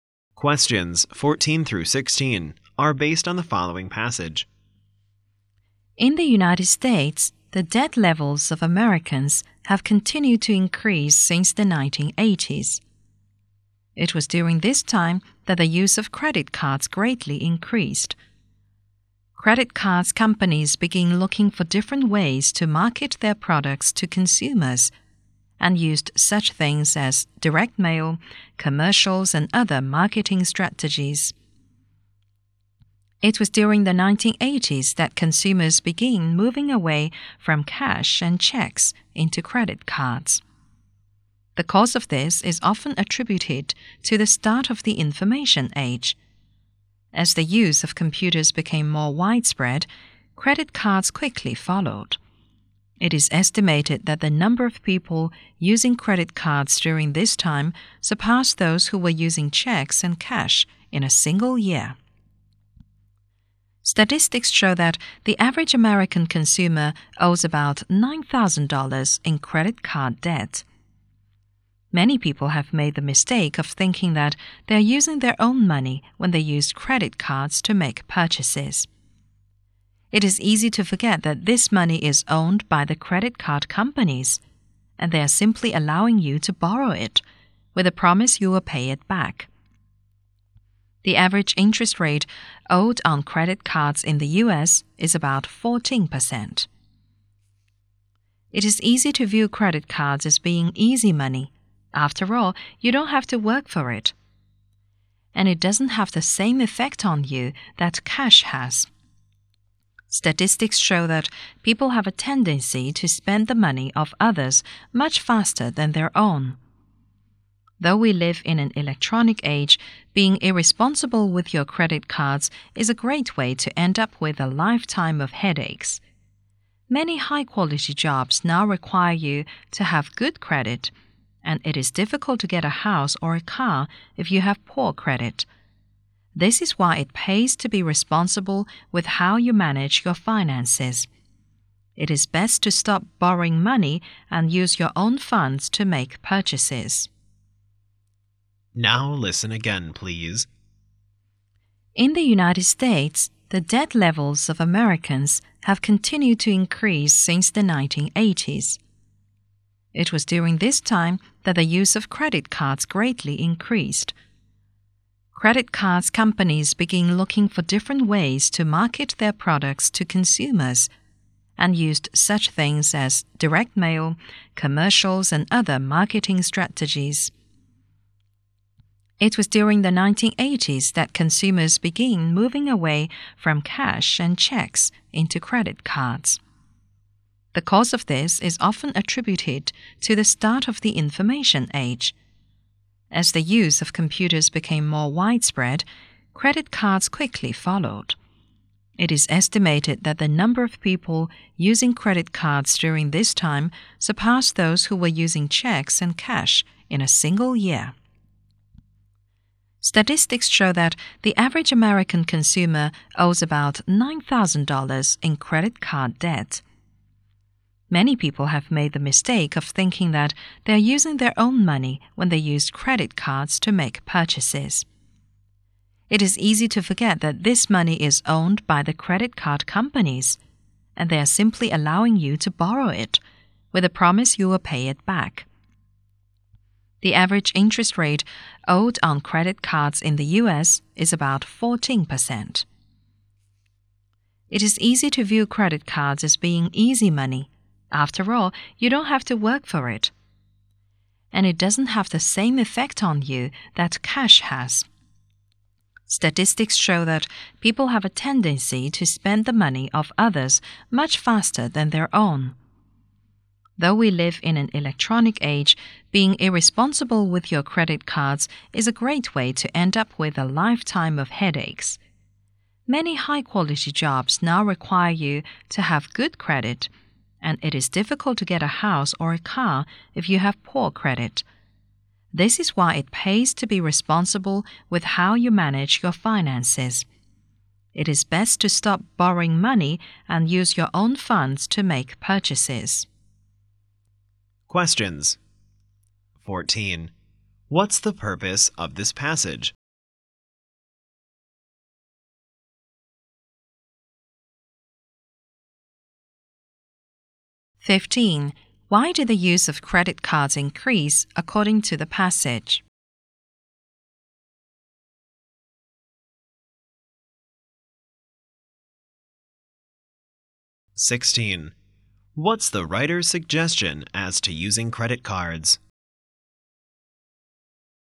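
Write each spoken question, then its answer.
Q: Why did the use of credit cards increase according to the passage?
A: Because of the start of the information age and wider use of computers.

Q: What's the writer's suggestion as to using credit cards?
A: Stop borrowing and use your own money.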